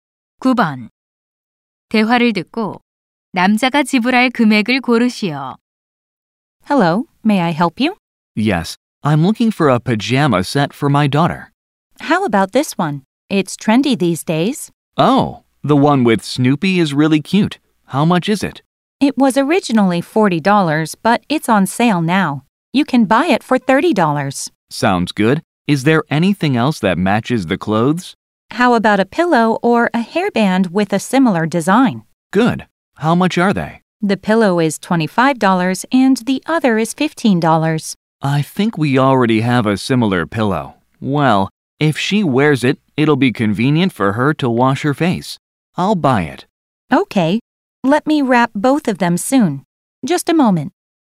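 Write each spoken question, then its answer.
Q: 대화를 듣고 남자가 지불할 금액을 고르시오.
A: 45달러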